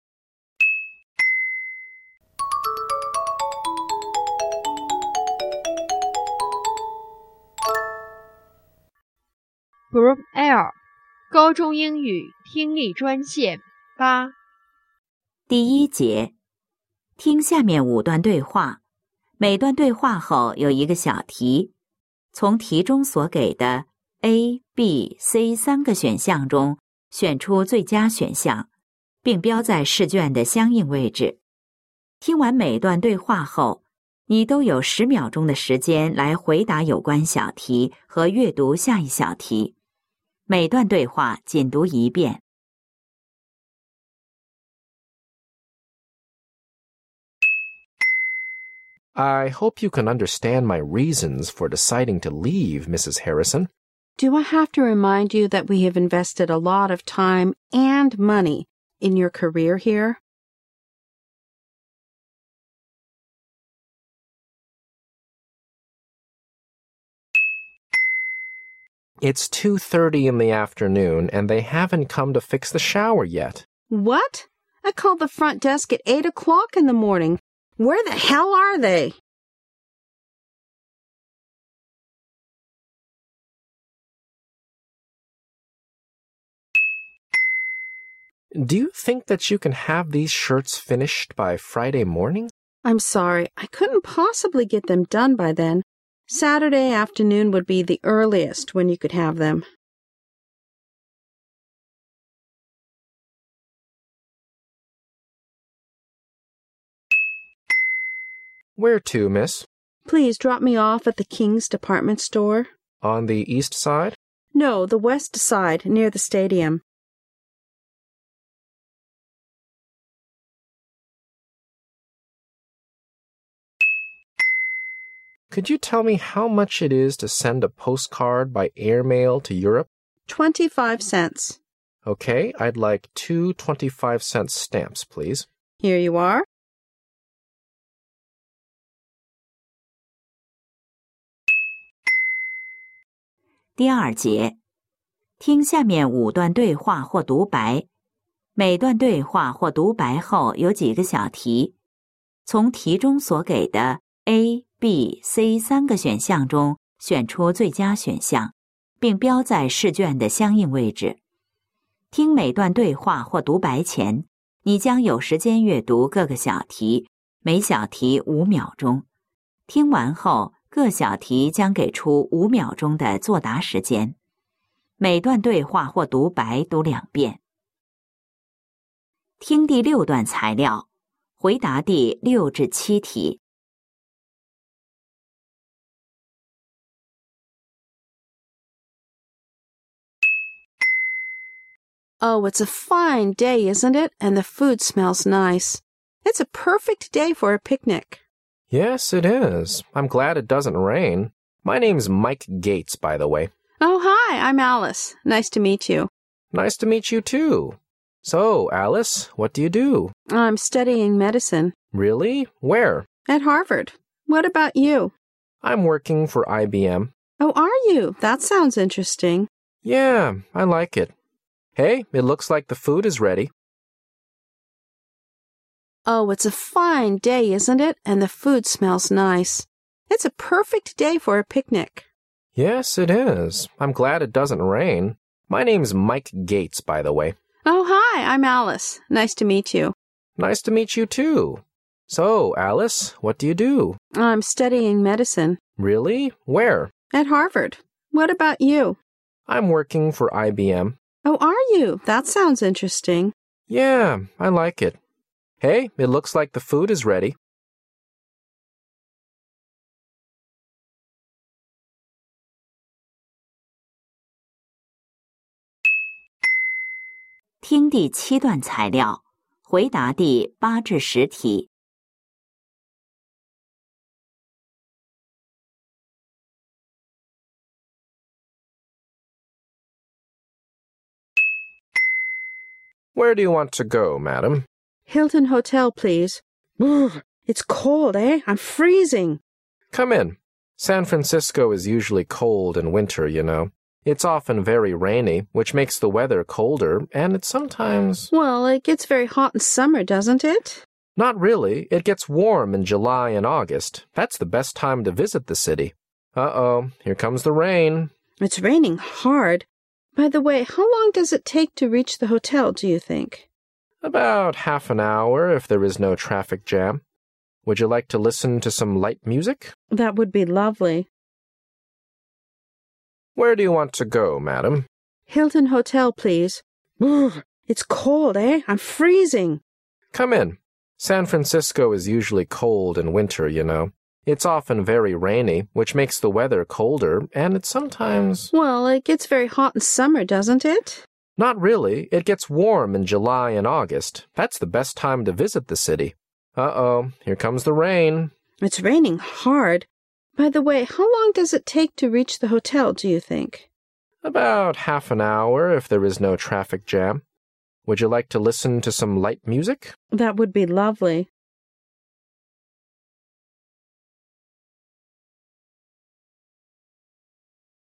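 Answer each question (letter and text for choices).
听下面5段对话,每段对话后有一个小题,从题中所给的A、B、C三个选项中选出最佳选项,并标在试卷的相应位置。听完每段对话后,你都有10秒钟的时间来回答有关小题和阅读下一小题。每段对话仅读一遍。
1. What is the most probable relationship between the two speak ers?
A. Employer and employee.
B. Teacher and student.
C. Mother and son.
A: A. Employer and employee.

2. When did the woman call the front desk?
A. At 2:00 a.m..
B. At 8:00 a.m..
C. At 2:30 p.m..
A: B. At 8:00 a.m..

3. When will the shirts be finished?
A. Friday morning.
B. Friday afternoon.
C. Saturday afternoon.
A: C. Saturday afternoon.

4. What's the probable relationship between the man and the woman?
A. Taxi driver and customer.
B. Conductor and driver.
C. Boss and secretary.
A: A. Taxi driver and customer.

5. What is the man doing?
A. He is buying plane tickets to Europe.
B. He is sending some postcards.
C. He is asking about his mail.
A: B. He is sending some postcards.

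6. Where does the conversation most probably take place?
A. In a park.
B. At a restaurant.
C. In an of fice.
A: A. In a park.

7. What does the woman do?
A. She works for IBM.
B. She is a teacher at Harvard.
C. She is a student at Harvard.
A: C. She is a student at Harvard.

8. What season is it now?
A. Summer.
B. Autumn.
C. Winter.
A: C. Winter.

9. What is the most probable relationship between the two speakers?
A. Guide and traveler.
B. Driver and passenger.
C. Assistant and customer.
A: B. Driver and passenger.

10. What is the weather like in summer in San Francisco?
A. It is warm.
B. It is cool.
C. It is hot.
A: A. It is warm.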